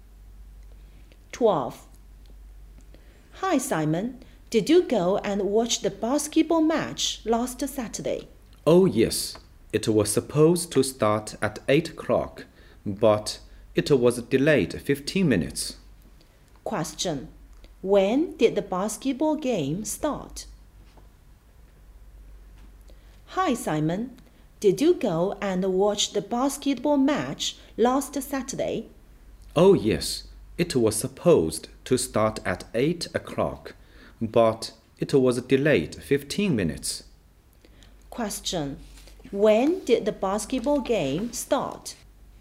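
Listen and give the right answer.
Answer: At 8:15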